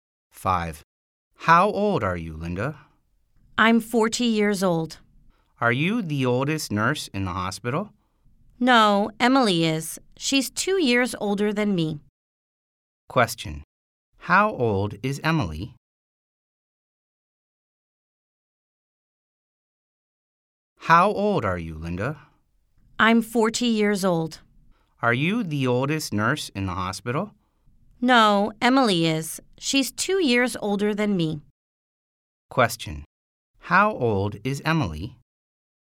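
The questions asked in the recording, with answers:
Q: How old is Emily?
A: 42 years old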